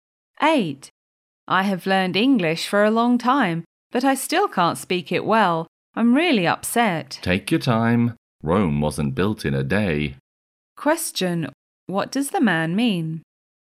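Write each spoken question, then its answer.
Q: What does the man mean?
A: Learning takes time, so she should be patient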